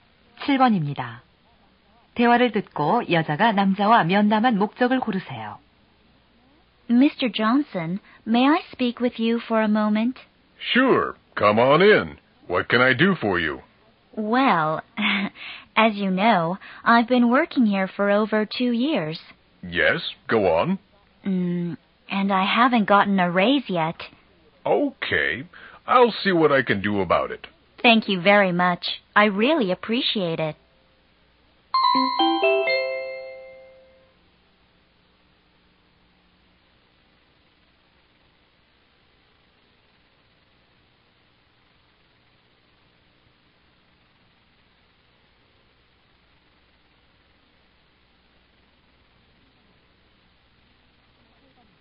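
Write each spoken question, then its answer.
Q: 대화를 듣고 여자가 남자와 면담한 목적을 고르세요.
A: 급여 인상 요청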